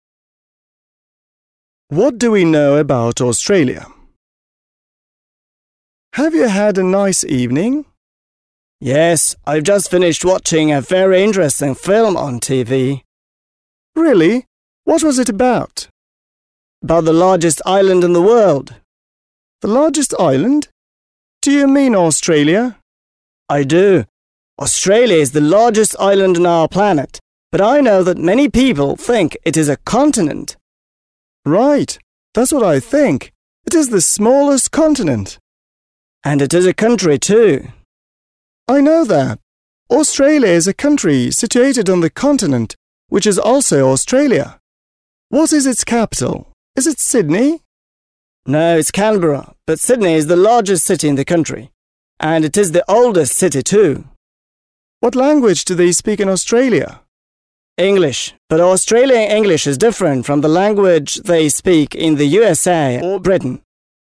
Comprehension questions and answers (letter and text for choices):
Listen and complete the statements.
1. Tom says he was watching ... .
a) a video about Australia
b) a film about Australia on TV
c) a film about Australia at the cinema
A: b) a film about Australia on TV

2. Tom says Australia is ... .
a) the smallest island of the world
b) the largest continent of the world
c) the largest island and the smallest continent of the world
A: c) the largest island and the smallest continent of the world

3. Tom says ... .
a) Canberra is the capital of the country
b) Sydney is the capital of the country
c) once Sydney was the capital of the country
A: a) Canberra is the capital of the country

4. Tom says that people in Australia speak ... .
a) British English and American English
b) Australian English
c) the English language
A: b) Australian English

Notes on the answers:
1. Ключевая фраза в аудио: «I've just finished watching a very interesting film on TV.» Почему выбран этот ответ: Том конкретизирует источник — TV (телевизор) и формат — film (фильм). Варианты про кинотеатр (cinema) или просто видео (video) не подходят, так как противоречат услышанному контексту.
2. Почему выбран этот ответ: В диалоге упоминаются обе характеристики Австралии. Она уникальна тем, что является одновременно и островом, и континентом. Поэтому правильный ответ объединяет оба факта (вариант c).
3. Ключевая фраза в аудио: «No, it's Canberra, but Sydney is the largest city...» Почему выбран этот ответ: Собеседник спрашивает, является ли столицей Сидней. Том исправляет его, указывая на Канберру. Это классическая «ловушка» в тестах про Австралию, так как Сидней более известен, но столицей не является.
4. Ключевая фраза в аудио: «Australian English is different from the language they speak in the USA or Britain.» Почему выбран этот ответ: Хотя технически язык — английский, Том делает акцент на том, что это особая разновидность — Australian English. В тесте нужно выбрать наиболее точный вариант, соответствующий словам спикера, поэтому вариант просто «the English language» будет недостаточно полным в данном контексте.

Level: 7 класс